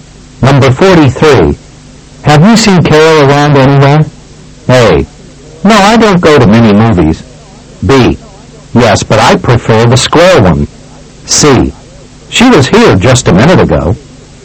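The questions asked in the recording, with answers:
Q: Have you seen Carol around anywhere?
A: C: She was here just a minute ago.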